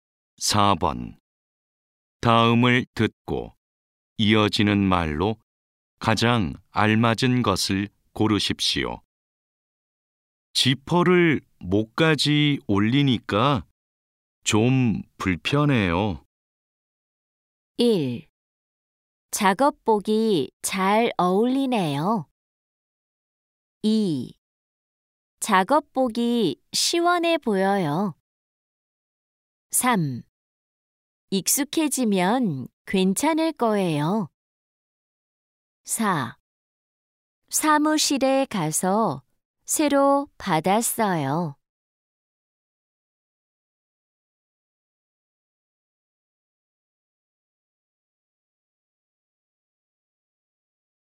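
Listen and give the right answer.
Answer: 3: 익숙해지면 괜찮을 거예요.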